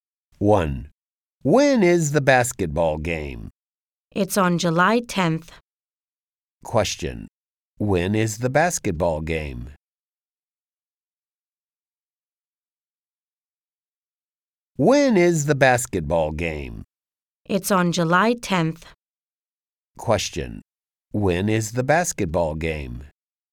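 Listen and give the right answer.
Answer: On July 10th.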